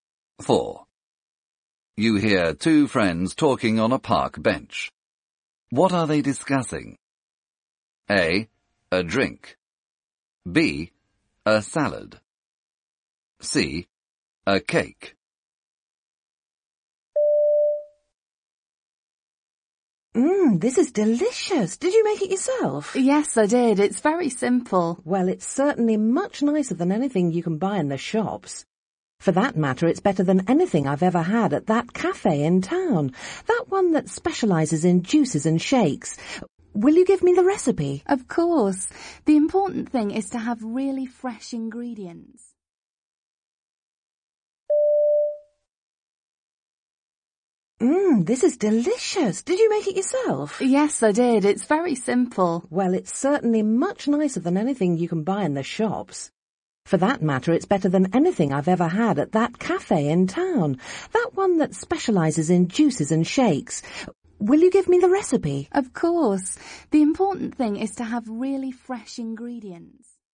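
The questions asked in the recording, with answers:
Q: What are they discussing?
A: A: A drink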